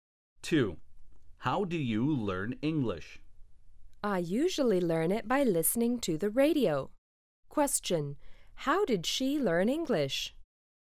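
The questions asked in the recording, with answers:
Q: How did she learn English?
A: By listening to the radio.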